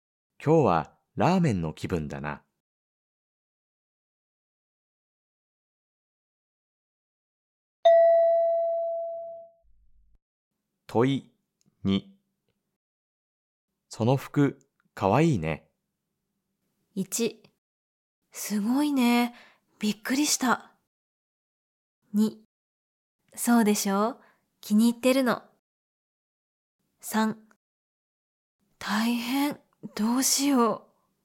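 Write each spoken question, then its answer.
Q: その服、かわいいね。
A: 2: そうでしょう。気に入ってるの。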